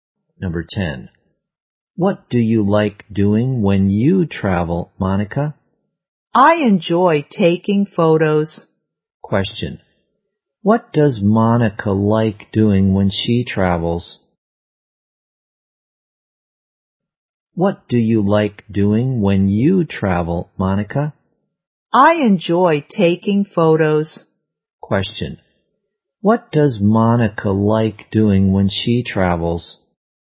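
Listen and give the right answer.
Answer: Taking photos.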